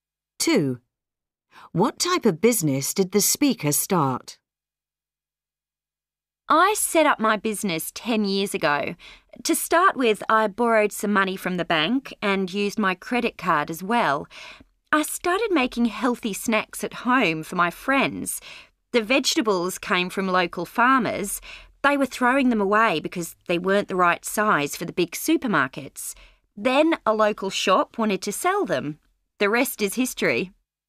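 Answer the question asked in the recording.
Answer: Making healthy snacks (a food business)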